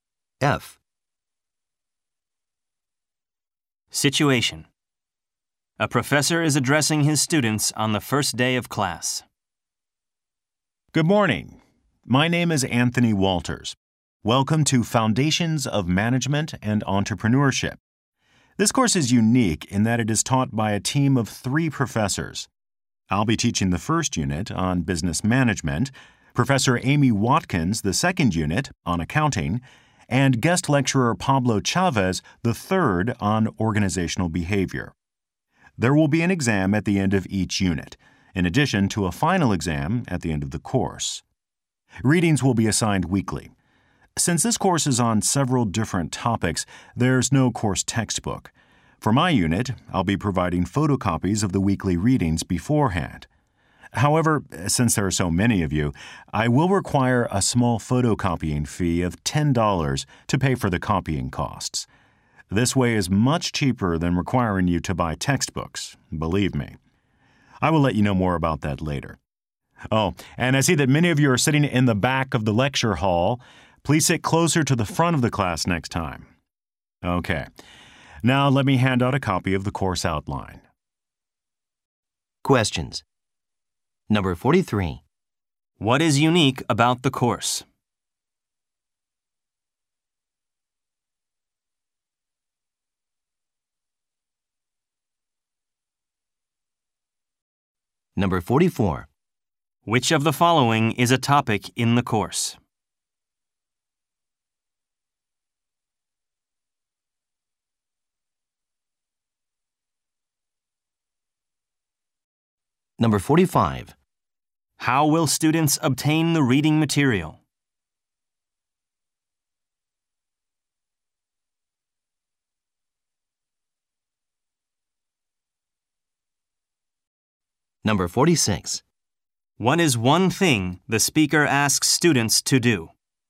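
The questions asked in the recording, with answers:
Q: What is unique about the course?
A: It is taught by a team of three professors

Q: How will students obtain the reading material?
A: Photocopies provided by the professor for a $10 fee

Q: What is one thing the speaker asks students to do?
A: Sit closer to the front of the class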